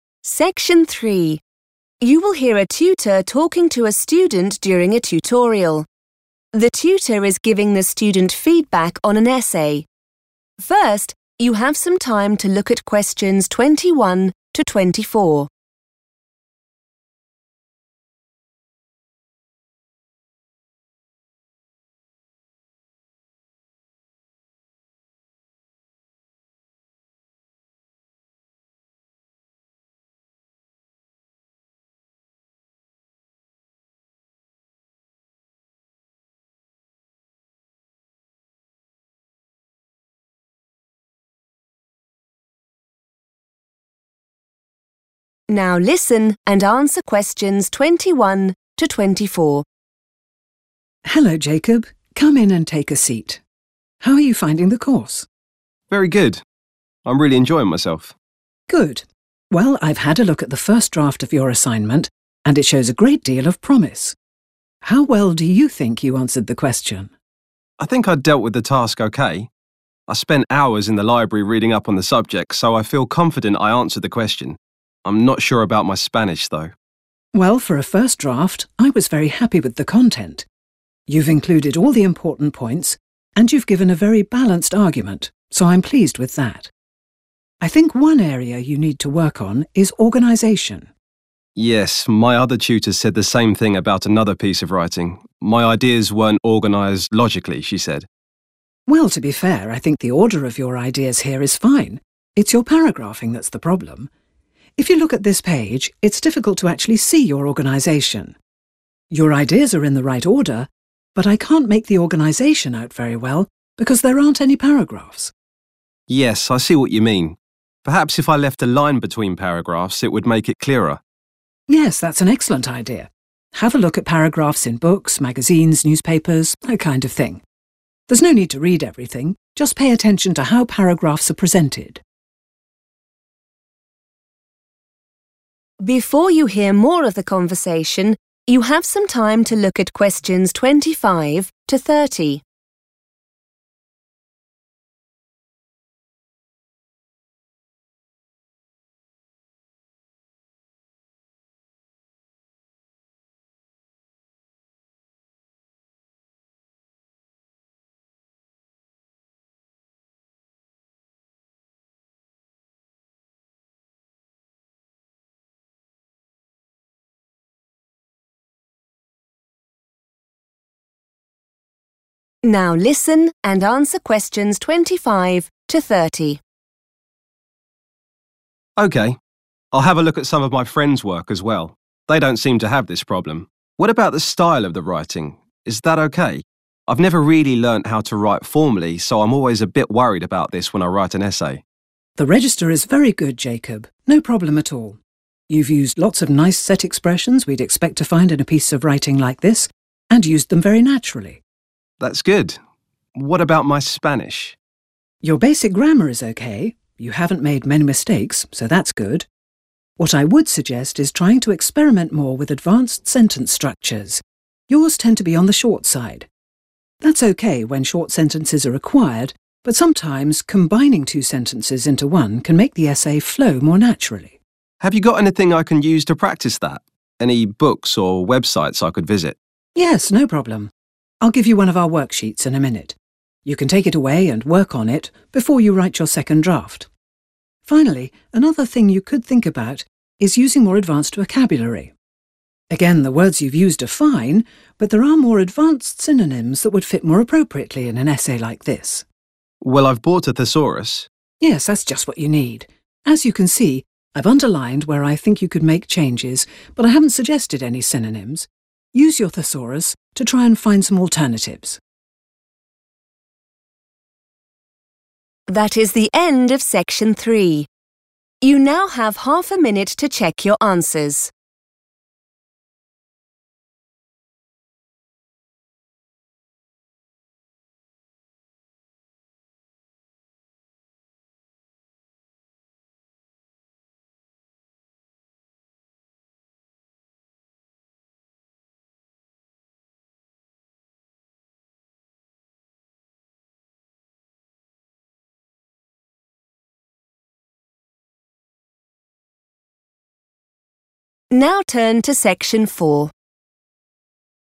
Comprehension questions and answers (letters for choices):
Choose the correct letter, A, B or C.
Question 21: Jacob says that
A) he needs to do more research.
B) he read widely before writing the draft.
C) he isn't confident about his main points.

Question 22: The tutor thinks Jacob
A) has presented both sides of the argument well.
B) needs to do more work on the content.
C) has organised the essay very well.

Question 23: The ideas Jacob expresses in the essay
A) should be re-ordered.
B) are poorly presented.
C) don't make sense.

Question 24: The tutor suggests that Jacob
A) look at the use of paragraphs in other pieces of writing.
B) read one or two textbooks on writing skills.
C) read widely to develop his vocabulary.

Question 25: Very natural use of _____ . Well done!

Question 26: Try using higher level _____ in your essays.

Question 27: The sentences are sometimes too _____ .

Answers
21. B
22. A
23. B
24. A
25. set expressions
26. sentence structures
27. short

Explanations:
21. The correct answer is correct because Jacob mentions that he spent a long time in the library studying the topic. When someone says they are "reading up on" a subject, it means they are doing research and reading many different things to learn more about it. This matches the idea of reading widely.
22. The correct answer is A because the tutor says that the essay has a 'balanced argument.' This means Jacob explained both sides of the topic fairly. While the tutor mentions that Jacob needs to fix his paragraphing (organization) and use harder words (vocabulary), she is very happy with the content and the way the argument is presented.
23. The correct answer is B because the tutor says that Jacob's ideas are in the right order, but they are hard to see because he did not use paragraphs. In this context, 'poorly presented' means the visual layout of the writing makes the organization difficult to understand.
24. The correct answer is correct because the teacher identifies paragraphing as the main problem in Jacob's essay. To help him improve, the teacher advises him to look at different types of reading materials, such as books and newspapers, to observe how they organize their text into paragraphs. The teacher specifically mentions that Jacob does not need to read the content, just focus on the 'presentation' or look of the paragraphs.
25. The correct answer is 'set expressions' because the tutor specifically praises Jacob for using these common phrases correctly. In the conversation, the tutor mentions that the writing style is good and that Jacob used these expressions in a way that feels 'very natural' for the type of essay he wrote.
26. The correct answer comes from the part where the tutor gives Jacob advice on how to improve his writing. The tutor uses the word 'advanced', which has the same meaning as 'higher level' in the task notes. The tutor suggests that Jacob should use these 'sentence structures' because his current sentences are often too short.
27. The correct answer is "short" because the tutor specifically tells Jacob that his sentences are usually "on the short side." She suggests that making his sentences longer by combining them would make his writing better. Therefore, the notes say the sentences are sometimes too short.

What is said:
Tutor: Hello Jacob. Come in and take a seat. How are you finding the course?
Jacob: Very good. I'm really enjoying myself.
Tutor: Good. Well, I've had a look at the first draft of your assignment and it shows a great deal of promise. How well do you think you answered the question?
Jacob: I think I dealt with the task okay. I spent hours in the library reading up on the subject so I feel confident I answered the question. I'm not sure about my Spanish though.
Tutor: Well, for a first draft I was very happy with the content ... You've included all the important points and you've given a very balanced argument so I'm pleased with that. I think one area you need to work on is organisation.
Jacob: Yes, my other tutor said the same thing about another piece of writing. My ideas weren't organised logically, she said.
Tutor: Well, to be fair, I think the order of your ideas here is fine. It's your paragraphing that's the problem. If you look at this page it's difficult to actually see your organisation. Your ideas are in the right order ... but I can't make the organisation out very well because there aren't any paragraphs.
Jacob: Yes, I see what you mean. Perhaps if I left a line between paragraphs it would make it clearer.
Tutor: Yes, that's an excellent idea. Have a look at paragraphs in books, magazines, newspapers ... that kind of thing. There's no need to read everything ... Just pay attention to how paragraphs are presented.
Jacob: Okay. I'll have a look at some of my friends' work as well. They don't seem to have this problem. What about the style of the writing? Is that okay? I've never really learnt how to write formally so I'm always a bit worried about this when I write an essay.
Tutor: The register is very good Jacob, no problem at all. You've used lots of nice set expressions we'd expect to find in a piece of writing like this and used them very naturally.
Jacob: That's good. What about my Spanish?
Tutor: Your basic grammar is okay; you haven't made many mistakes so that's good. What I would suggest is trying to experiment more with advanced sentence structures. Yours tend to be on the short side. That's okay when short sentences are required but sometimes combining two sentences into one can make the essay flow more naturally.
Jacob: Have you got anything I can use to practise that? Any books or websites I could visit?
Tutor: Yes, no problem. I'll give you one of our worksheets in a minute. You can take it away and work on it before you write your second draft. Finally, another thing you could think about is using more advanced vocabulary. Again, the words you've used are fine but there are more advanced synonyms that would fit more appropriately in an essay like this.
Jacob: Well I've bought a thesaurus.
Tutor: Yes, that's just what you need. As you can see, I've underlined where I think you could make changes but I haven't suggested any synonyms. Use your thesaurus to try and find some alternatives ...